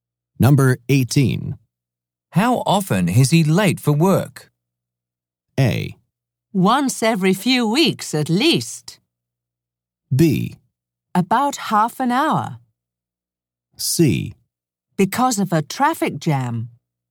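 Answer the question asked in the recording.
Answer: A: Once every few weeks at least.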